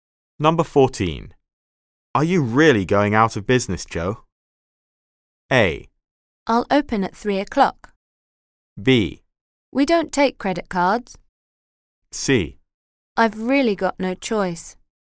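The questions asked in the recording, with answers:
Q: Are you really going out of business, Joe?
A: C: I've really got no choice.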